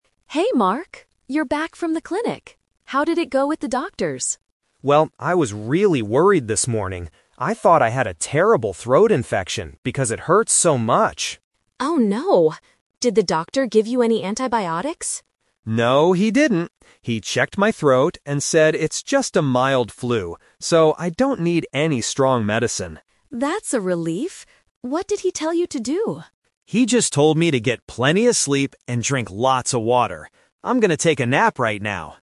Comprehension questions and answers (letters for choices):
Listen to the conversation between two roommates. Choose the correct answer (A, B, or C) for each question.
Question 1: What did Mark think he had before seeing the doctor?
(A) A mild flu.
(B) A throat infection.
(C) A bad headache.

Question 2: What did the doctor tell Mark to do?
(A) Take some strong medicine.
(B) Sleep a lot and drink water.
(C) Go back to the clinic next week.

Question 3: What is Mark going to do immediately after the conversation?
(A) Go to the pharmacy to buy antibiotics.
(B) Drink a large glass of warm water.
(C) Take a nap in his room.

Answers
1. B
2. B
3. C

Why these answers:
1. Mark says, "I thought I had a terrible throat infection..." Trap A is wrong (The Twist): A "mild flu" is what the doctor told him he actually has, not what Mark thought he had at first. Trap C is wrong: A headache is not mentioned in the conversation.
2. Mark explains the doctor's advice: "He just told me to get plenty of sleep and drink lots of water." Trap A is wrong: Mark clearly says, "I don't need any strong medicine." The option is mentioned but rejected. Trap C is wrong: Returning to the clinic is a plausible action for a sick person, but it is not mentioned in the audio.
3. At the very end of the conversation, Mark says, "I'm going to take a nap right now." Trap A is wrong: Lisa asks about "antibiotics", but Mark says the doctor didn't give him any, so he doesn't need to go to the pharmacy. Trap B is wrong: While the doctor advised him to drink water, Mark's immediate next action is taking a nap.

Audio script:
Lisa: Hey Mark. You're back from the clinic. How did it go at the doctor's?
Mark: Well, I was really worried this morning. I thought I had a terrible throat infection because it hurt so much.
Lisa: Oh no. Did the doctor give you any antibiotics?
Mark: No, he didn't. He checked my throat and said it's just a mild flu. So, I don't need any strong medicine.
Lisa: That's a relief! What did he tell you to do?
Mark: He just told me to get plenty of sleep and drink lots of water. I'm going to take a nap right now.